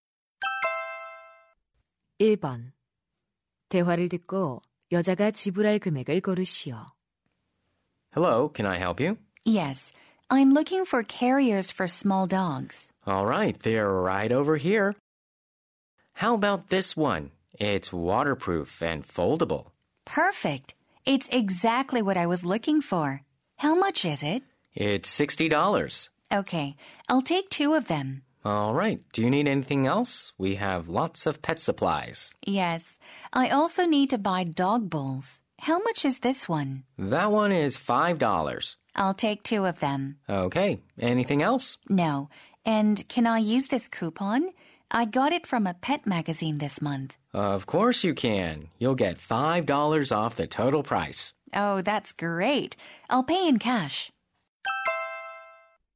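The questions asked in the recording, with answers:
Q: 대화를 듣고 여자가 지불할 금액을 고르시오.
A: $125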